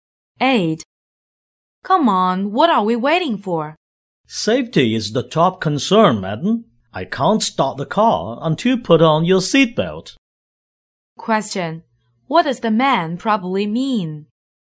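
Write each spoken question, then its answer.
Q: What does the man probably mean?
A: The woman should fasten her seatbelt first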